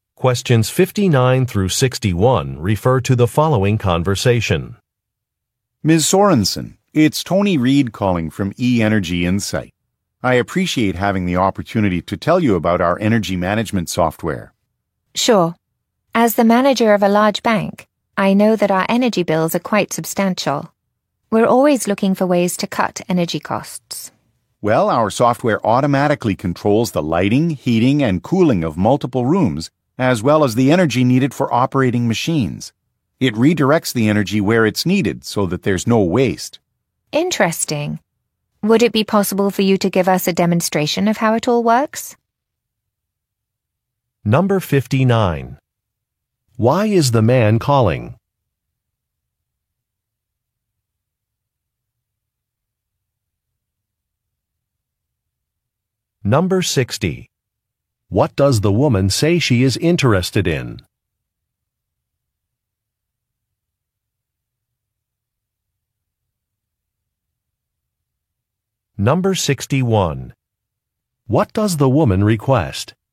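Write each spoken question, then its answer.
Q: Why is the man calling?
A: To tell her about his company's energy management software

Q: What does the woman say she is interested in?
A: Cutting energy costs

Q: What does the woman request?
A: A demonstration of the software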